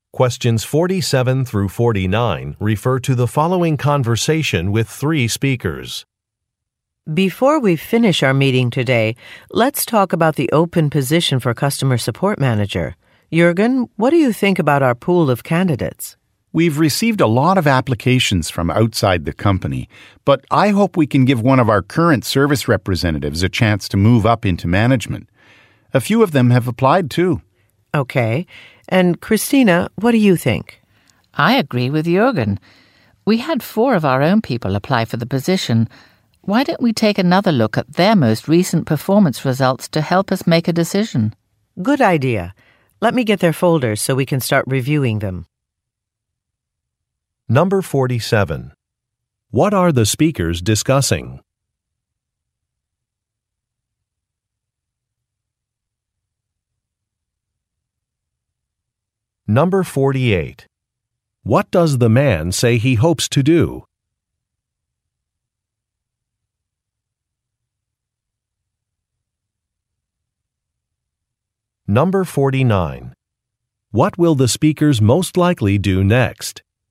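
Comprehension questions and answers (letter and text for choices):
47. What are the speakers discussing?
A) Filling a job opening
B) Planning a customer presentation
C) Organizing a research committee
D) Revising some sales figures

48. What does the man say he hopes to do?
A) Change a vacation policy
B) Move to a new facility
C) Win a client contract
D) Promote an employee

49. What will the speakers most likely do next?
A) Watch a video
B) Review some documents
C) Contact a manager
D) Submit some questions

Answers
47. A) Filling a job opening
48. D) Promote an employee
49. B) Review some documents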